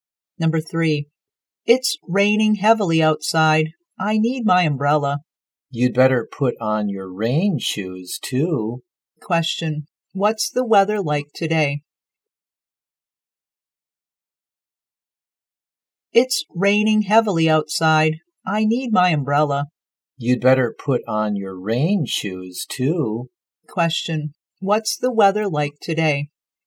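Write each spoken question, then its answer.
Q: what's the weather like today?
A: Rainy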